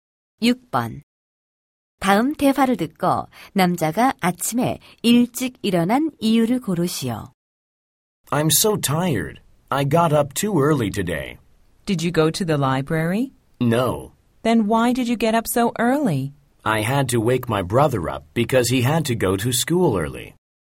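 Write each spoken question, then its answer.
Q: 다음 대화를 듣고 남자가 아침에 일찍 일어난 이유를 고르시오.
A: 남동생을 깨워야 해서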